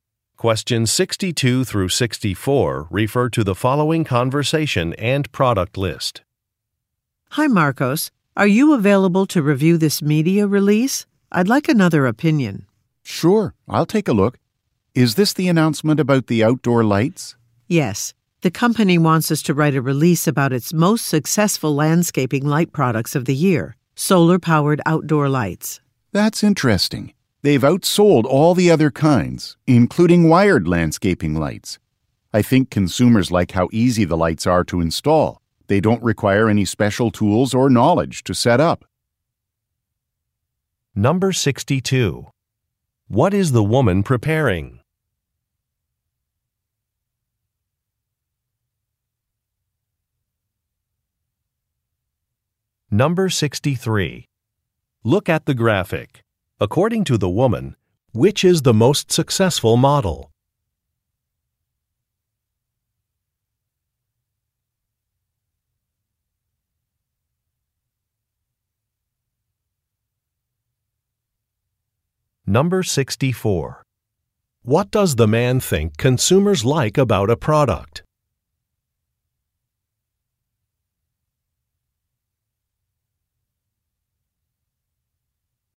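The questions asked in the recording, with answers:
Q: What is the woman preparing?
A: A media release

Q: What does the man think consumers like about a product?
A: It is easy to install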